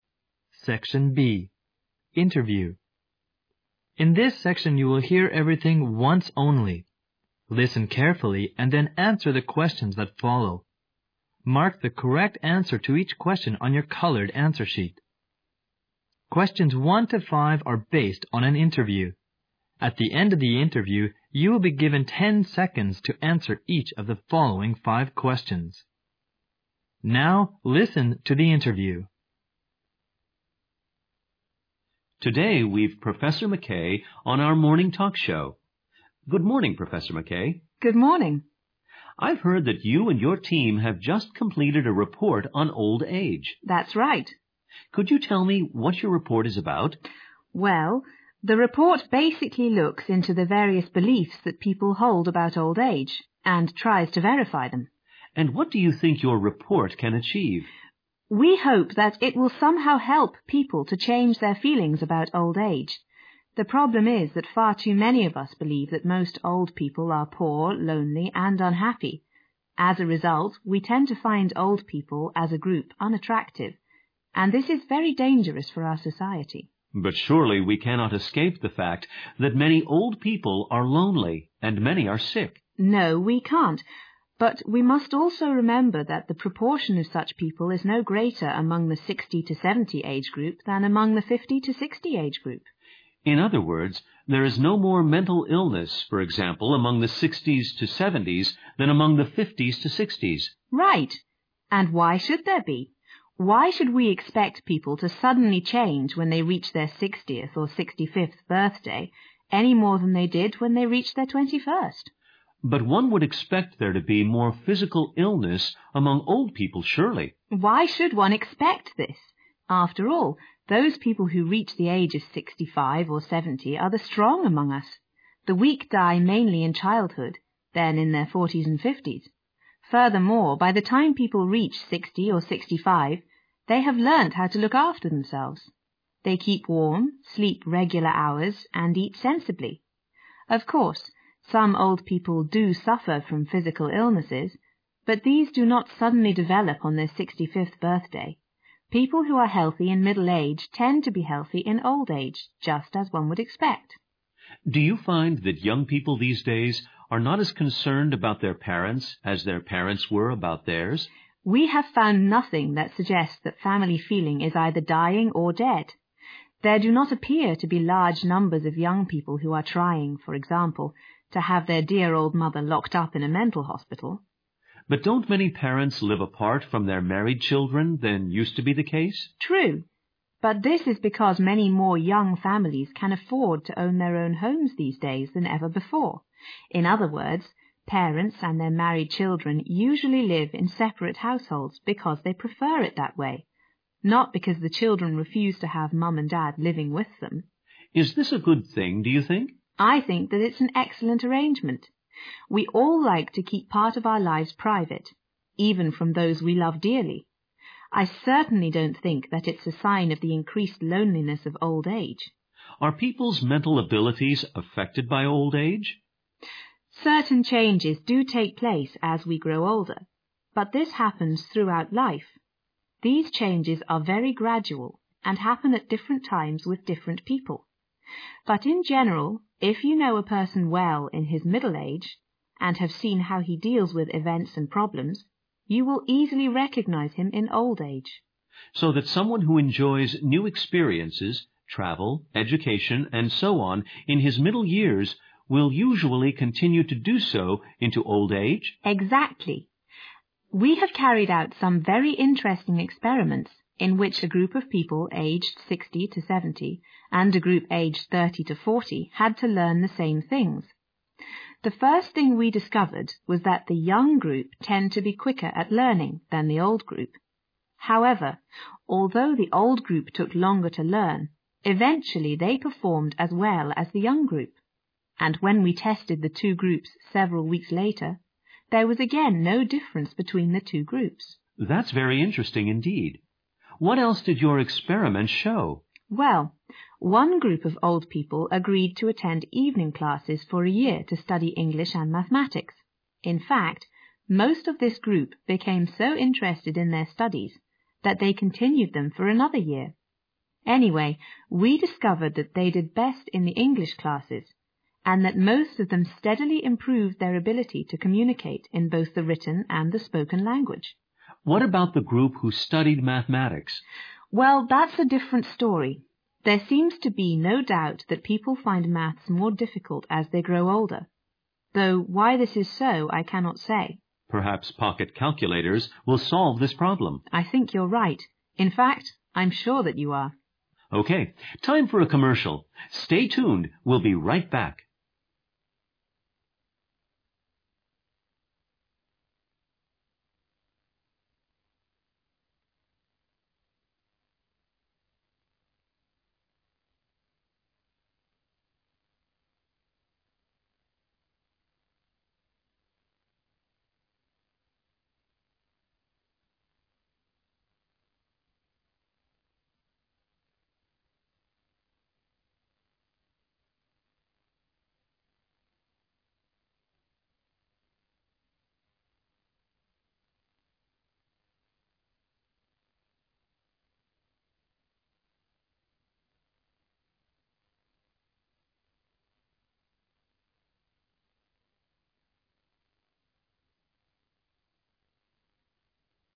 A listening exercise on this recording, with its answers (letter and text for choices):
Questions 1 to 5 are based on aninterview. At the end of the interview you will be given 10 seconds to answereach of the following five questions.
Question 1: What is the purpose of Professor McKay's report?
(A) To look into the mental healthof old people.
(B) To explain why people havenegative views on old age.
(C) To help correct some falsebeliefs about old age.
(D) To identify the variousproblems of old age.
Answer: (C) To help correct some falsebeliefs about old age.

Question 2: Which of the following is NOT Professor McKay's view?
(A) People change in old age a lotmore than at the age of 21.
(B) There are as many sick peoplein old age as in middle age.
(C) We should not expect morephysical illness among old people.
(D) We should not expect to findold people unattractive as a group.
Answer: (A) People change in old age a lotmore than at the age of 21.

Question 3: According to Professor McKay's report, _____.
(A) family love is graduallydisappearing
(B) it is hard to comment on familyfeeling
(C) more children are indifferentto their parents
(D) family love remains as strongas ever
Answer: (D) family love remains as strongas ever

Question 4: Professor McKay is _____ towards the tendency of more parents living apart fromtheir children.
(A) negative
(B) positive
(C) ambiguous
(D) neutral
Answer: (B) positive

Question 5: The only popular belief that Professor McKay is unable to provide evidenceagainst is _____.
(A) old-age sickness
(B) loose family ties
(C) poor mental abilities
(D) difficulties in maths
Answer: (D) difficulties in maths

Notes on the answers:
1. 细节题。录音中,女士提到,报告的目的是:look into the various beliefsthat people hold about old age并试图证实他们,随后,女士又指出,希望该报告能够帮助人们改变对变老的一些感受(change their feelingsabout old age),综合可得出报告的目的是让人们改变对年老的错误观念。
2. 细节题。采访中女士用反问的语气提出"为什么要觉得人们在60或65岁时会突然改变(suddenlychange),而不是在21岁时突然改变?",表明女士不赞同这一观点,A项符合。
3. 细节题。录音中女士提到"we have found nothing that suggests family feelingis either drying or dead",由此可见这位女士认为家庭情感仍旧和以前一样强烈,故选D项。
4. 细节题。谈到对年轻人与老人分居的看法时,professor McKay指出"it'san excellent arrangement",可判断,她对此举持积极态度。
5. 细节题。录音结尾部分,professor McKay谈到"无疑,随年龄的增长人们发现数学会越来越难",她还指出,具体原因是什么,她自己也不清楚。所以D项正确。

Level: GRADE EIGHT